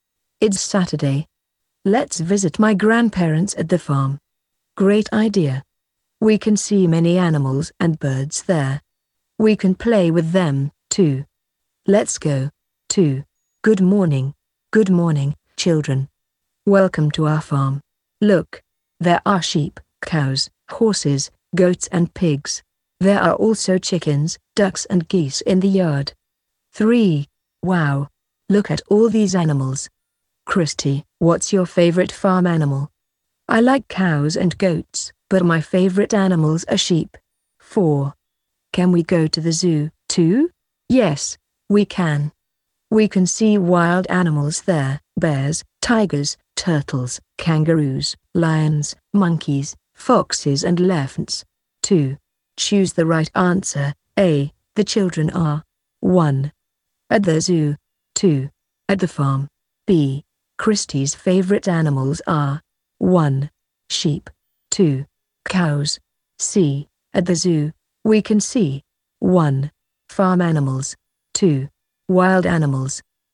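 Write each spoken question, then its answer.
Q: The children are. 1. At the zoo. 2. At the farm.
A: 2: At the farm.

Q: Christy's favorite animals are. 1. Sheep. 2. Cows.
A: 1: Sheep.

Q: At the zoo. We can see. 1. Farm animals. 2. Wild animals.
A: 2: Wild animals.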